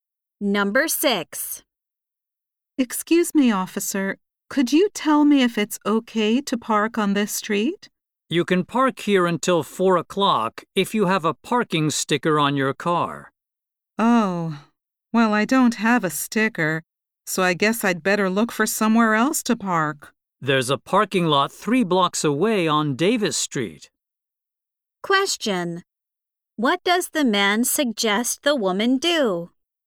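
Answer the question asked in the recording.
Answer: Park in the parking lot on Davis Street.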